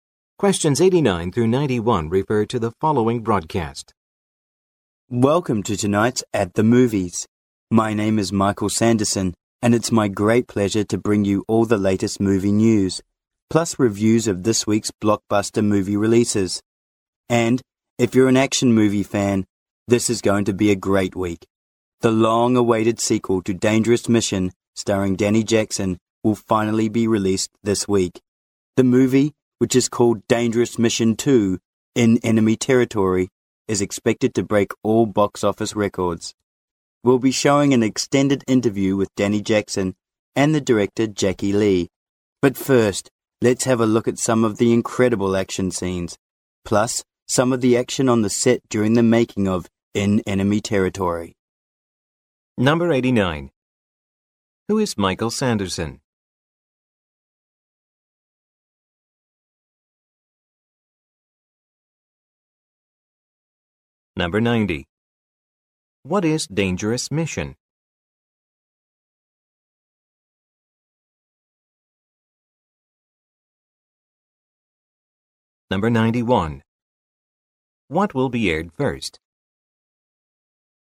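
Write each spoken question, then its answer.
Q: Who is Michael Sanderson?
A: A movie show host

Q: What is Dangerous Mission?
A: An action movie

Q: What will be aired first?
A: Action scenes from the movie and its set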